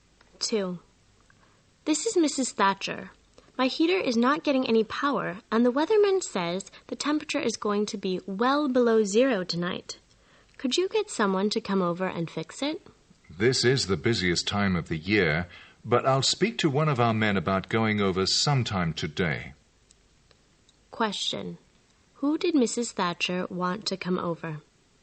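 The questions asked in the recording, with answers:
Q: Who did Mrs. Thatcher want to come over?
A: Someone to fix her heater (a repairman)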